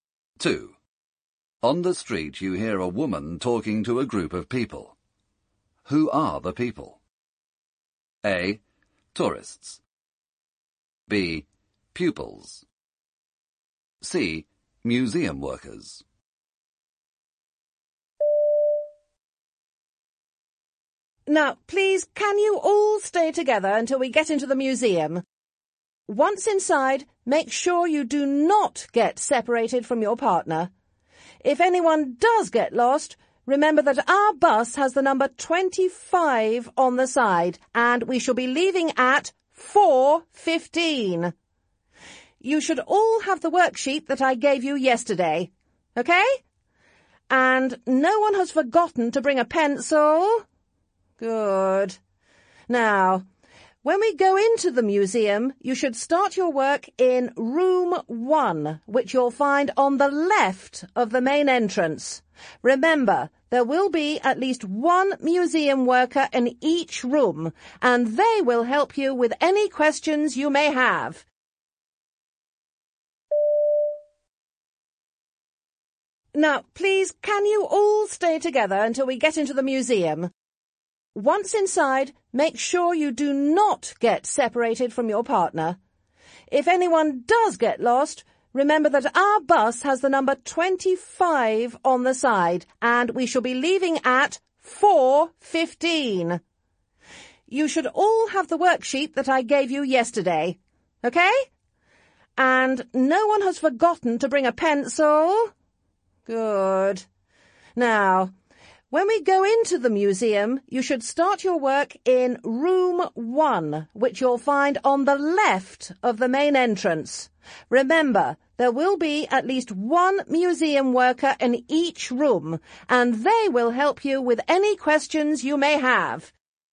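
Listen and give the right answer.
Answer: B: Pupils.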